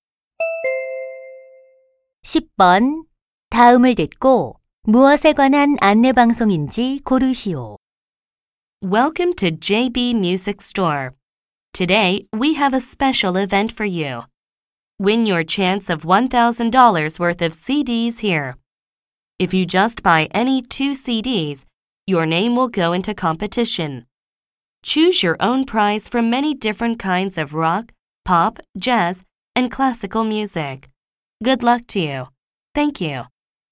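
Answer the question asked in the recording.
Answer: 음반 가게의 CD 경품 행사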